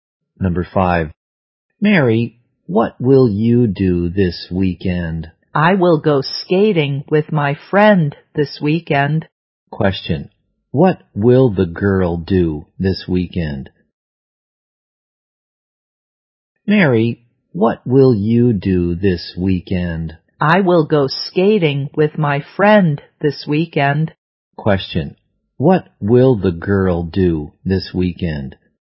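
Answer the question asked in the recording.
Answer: Go skating with her friend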